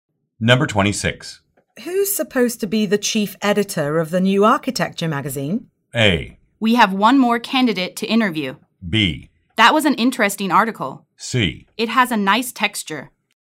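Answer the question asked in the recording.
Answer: A: We have one more candidate to interview.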